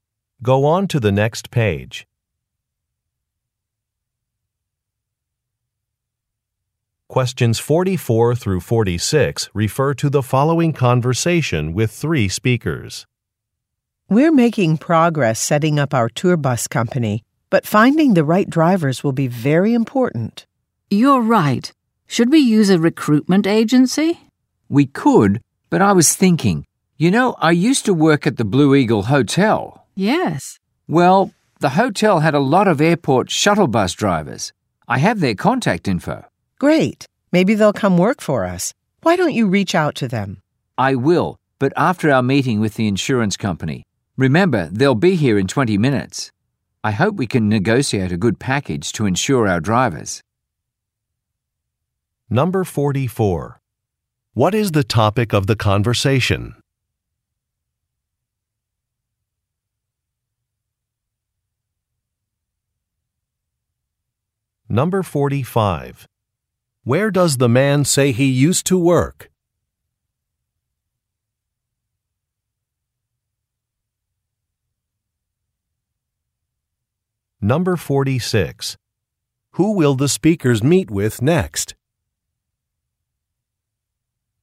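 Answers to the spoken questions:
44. Hiring drivers for their tour bus company
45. At the Blue Eagle Hotel
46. Representatives of an insurance company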